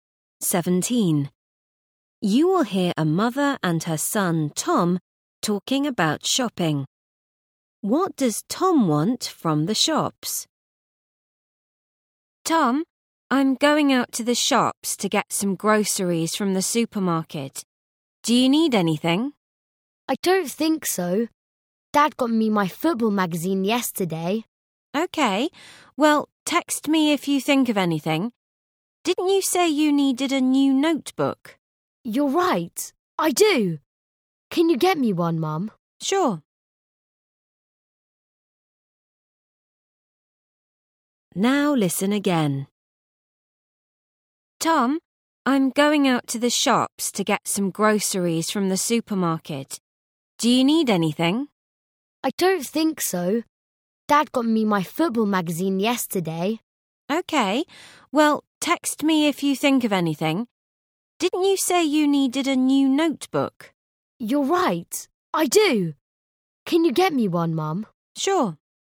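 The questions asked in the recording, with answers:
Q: What does Tom want from the shops?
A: A new notebook.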